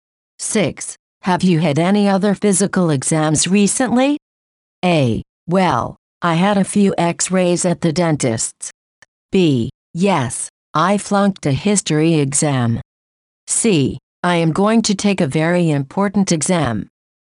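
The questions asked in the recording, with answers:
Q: Have you had any other physical exams recently?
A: A: Well, I had a few x-rays at the dentist's.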